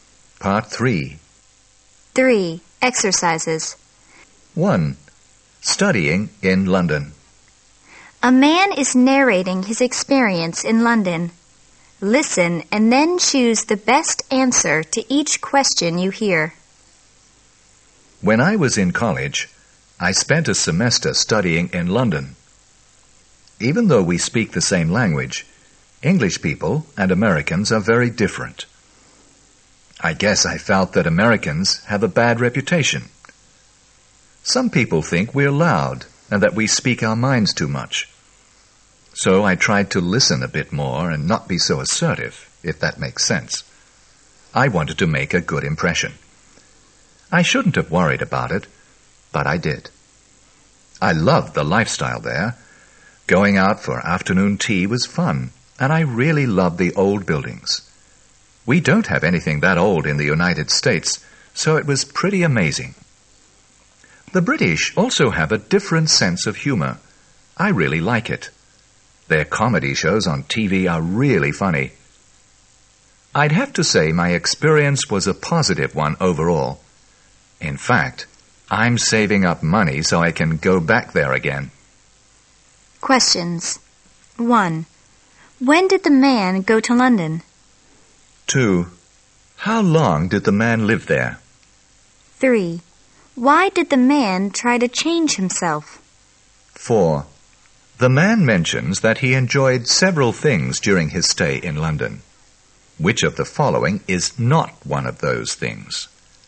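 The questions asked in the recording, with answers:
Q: When did the man go to London?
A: When he was in college

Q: How long did the man live there?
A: A semester

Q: Why did the man try to change himself?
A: Americans have a bad reputation and he wanted to make a good impression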